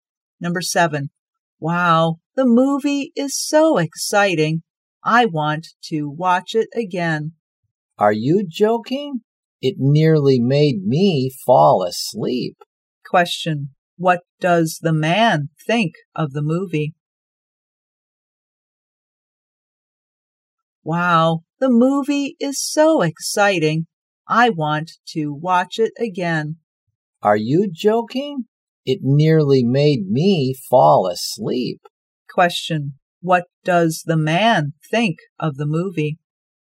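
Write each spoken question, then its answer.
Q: Question.What does the man think of the movie?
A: Boring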